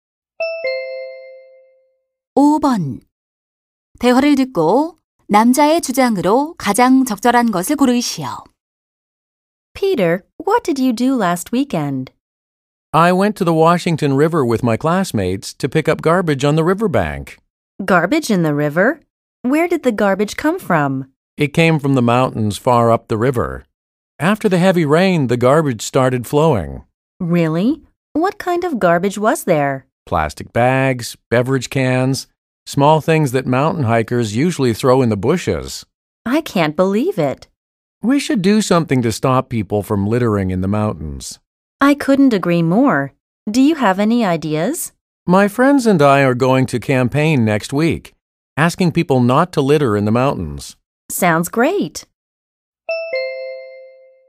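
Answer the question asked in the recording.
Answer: 산에 쓰레기를 버리지 말아야 한다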